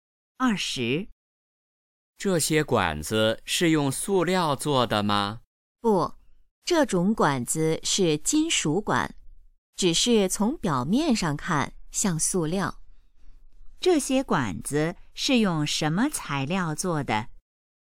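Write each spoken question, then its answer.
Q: 这些管子是用什么材料做的?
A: 金属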